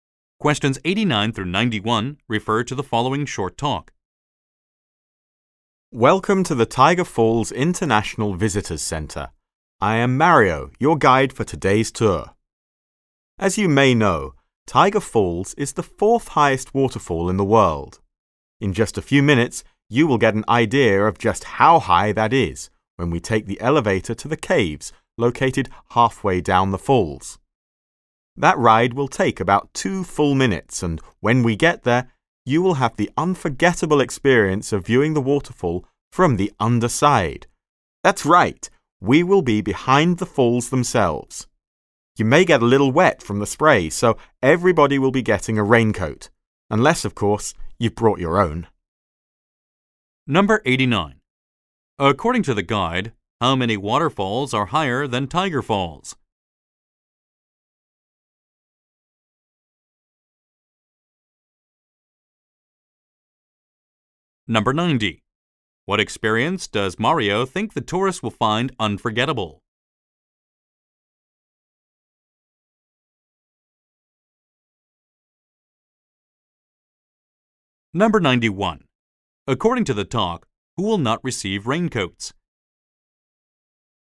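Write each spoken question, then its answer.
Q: According to the guide, how many waterfalls are higher than Tiger Falls?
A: Three

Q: What experience does Mario think the tourists will find unforgettable?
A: Viewing the waterfall from behind, on its underside

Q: According to the talk, who will not receive raincoats?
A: People who brought their own raincoats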